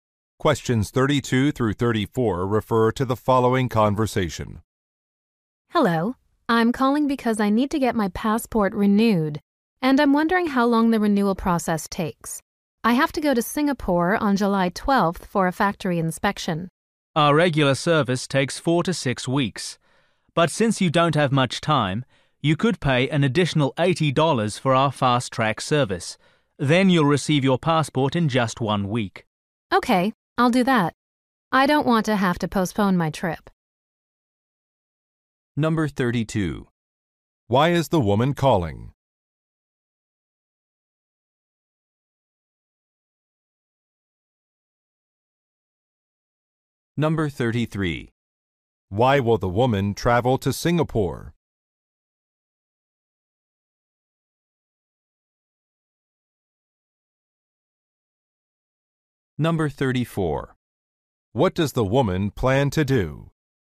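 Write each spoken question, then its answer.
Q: Why is the woman calling?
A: To ask how long a passport renewal takes

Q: Why will the woman travel to Singapore?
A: For a factory inspection

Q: What does the woman plan to do?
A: Pay extra for the fast-track service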